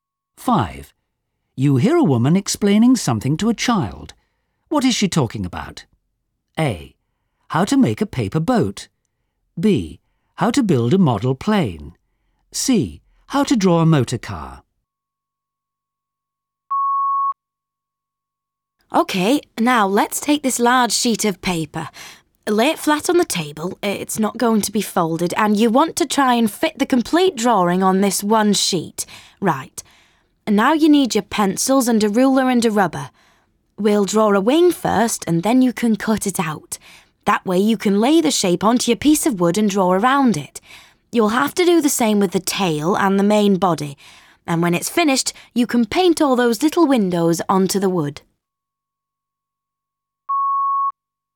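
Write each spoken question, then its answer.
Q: What is she talking about?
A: B: How to build a model plane.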